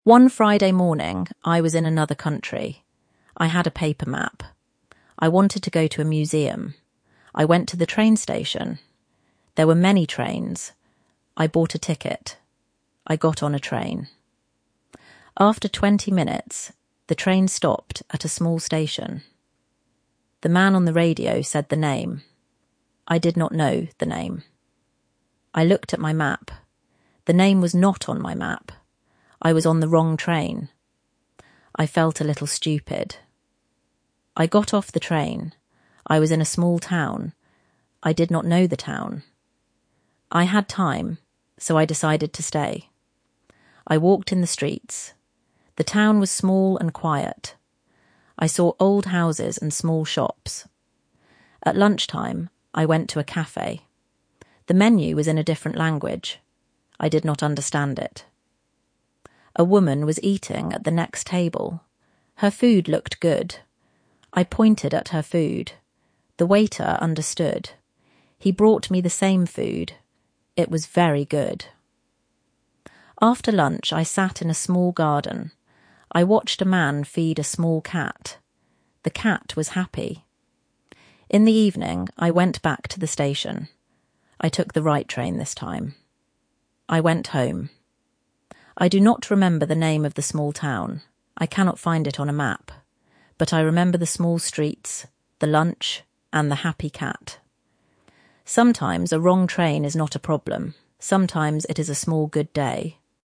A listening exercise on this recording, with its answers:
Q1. Where did the narrator want to go?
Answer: To a museum.

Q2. How did the narrator know they were on the wrong train?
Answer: The name was not on the narrator's map.

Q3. What did the narrator do when they realised the mistake?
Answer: They got off the train.

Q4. What did the narrator see in the town?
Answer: Small streets, old houses, and small shops.

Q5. What was the problem with the menu in the café?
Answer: The menu was in a different language.

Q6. How did the narrator order food?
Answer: The narrator pointed at her food.

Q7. What did the narrator do after lunch?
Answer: They sat in a small garden.

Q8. How did the narrator get home?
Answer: took the right train this time.

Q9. What does the narrator remember now?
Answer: The small streets, the lunch, and the happy cat.

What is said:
One Friday morning, I was in another country. I had a paper map. I wanted to go to a museum.
I went to the train station. There were many trains. I bought a ticket. I got on a train.
After twenty minutes, the train stopped at a small station. The man on the radio said the name. I did not know the name. I looked at my map. The name was not on my map.
I was on the wrong train! I felt a little stupid.
I got off the train. I was in a small town. I had time, so I decided to stay.
I walked in the streets. The town was small and quiet. I saw old houses and small shops.
At lunchtime, I went to a café. The menu was in a different language. I did not understand it.
A woman was eating at the next table. Her food looked good. I pointed at her food. The waiter understood. He brought me the same food. It was very good.
After lunch, I sat in a small garden. I watched a man feed a small cat. The cat was happy.
In the evening, I went back to the station. I took the right train this time. I went home.
I do not remember the name of the small town. I cannot find it on a map. But I remember the small streets, the lunch, and the happy cat.
Sometimes a wrong train is not a problem. Sometimes it is a small good day.